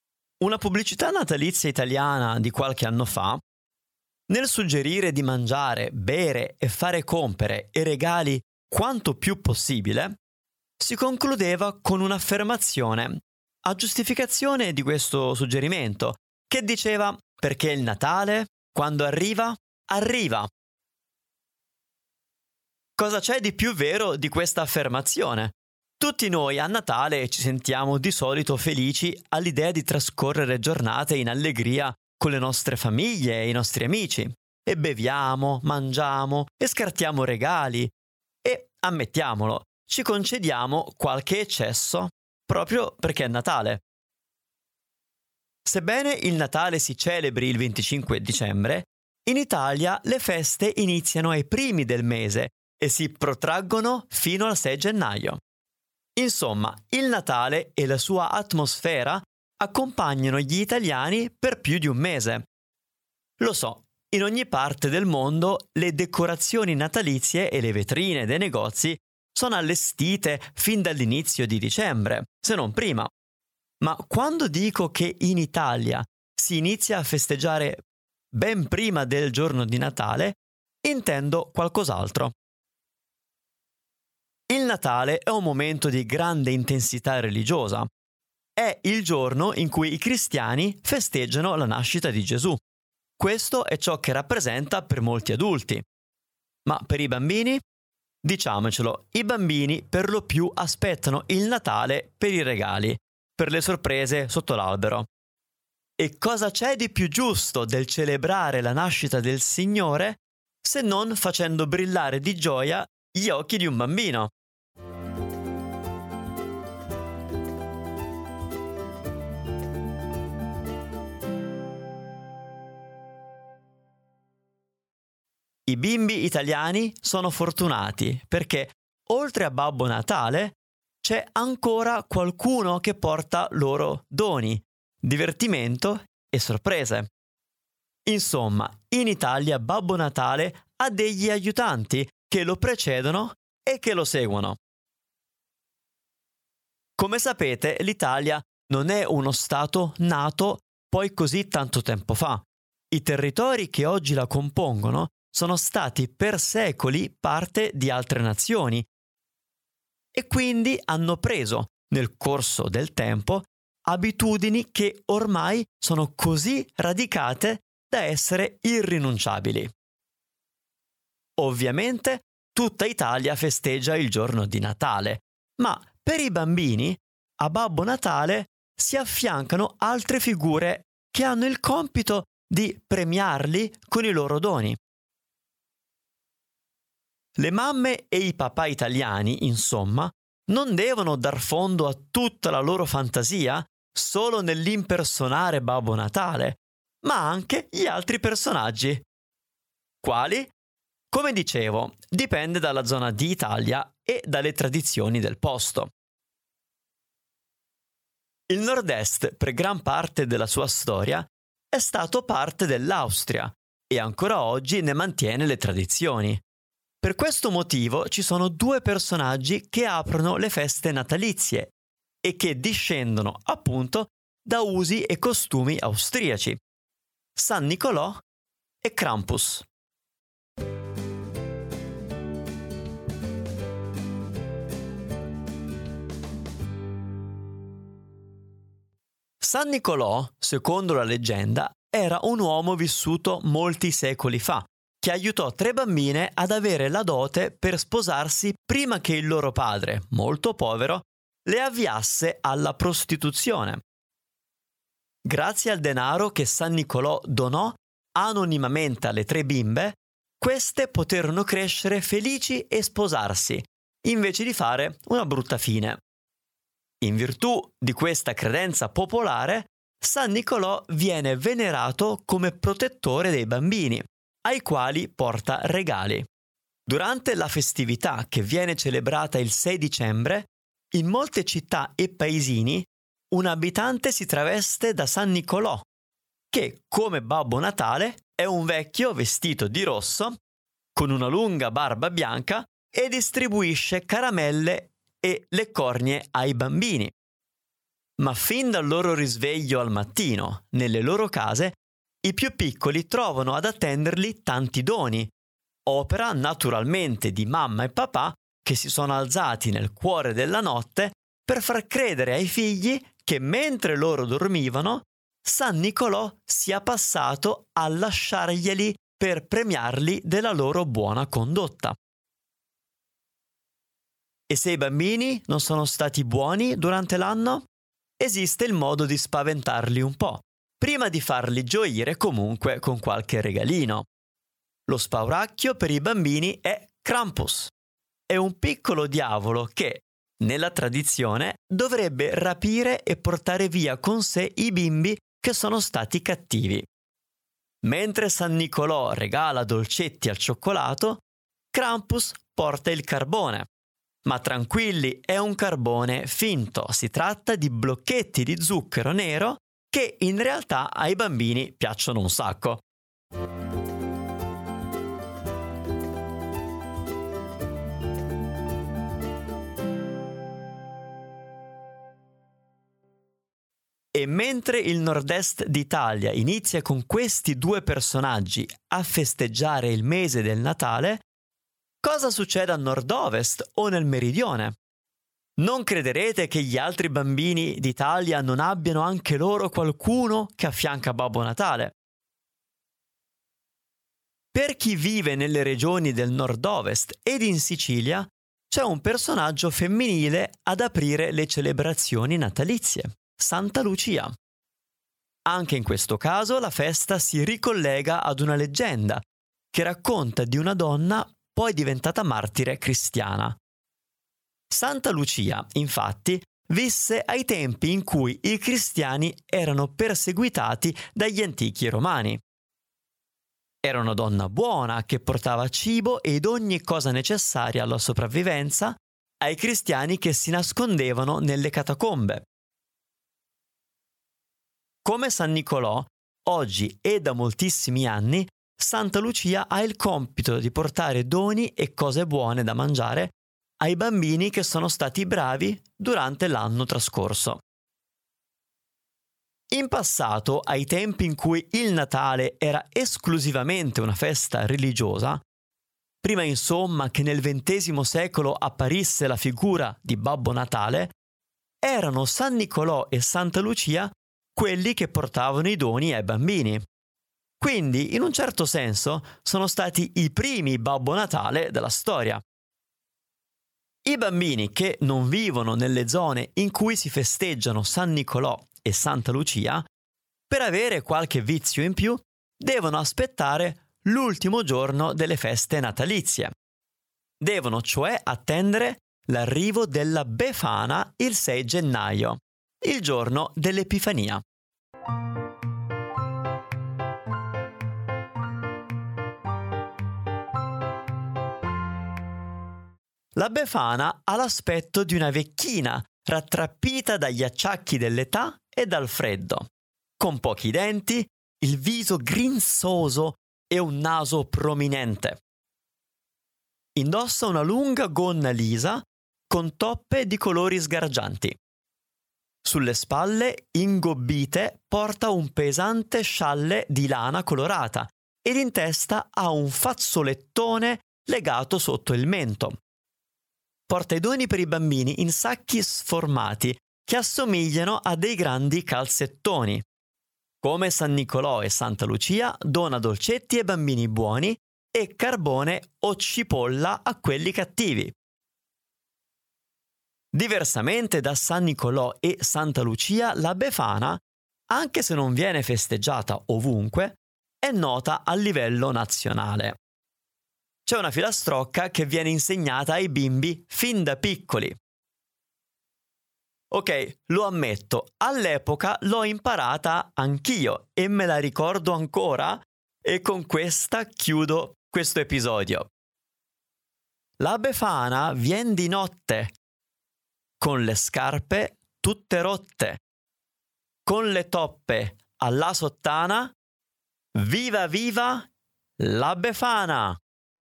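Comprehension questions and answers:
Here are your TRUE/ FALSE Comprehension questions.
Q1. In Italia i festeggiamenti per il Natale durano più di un mese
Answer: Vero

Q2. I bambini italiani aspettano i doni solo da Babbo Natale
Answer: Falso

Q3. Tutta Italia ha le stesse tradizioni natalizie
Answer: Falso

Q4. San Nicolò è il nome che i bambini italiani danno a Babbo Natale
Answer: Falso

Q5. Secondo la tradizione, Santa Lucia porta doni a tutti i bambini buoni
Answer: Vero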